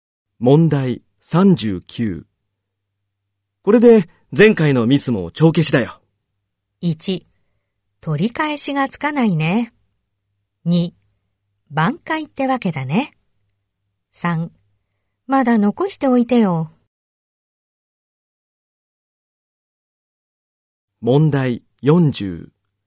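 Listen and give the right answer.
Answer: 2: 挽回ってわけだね。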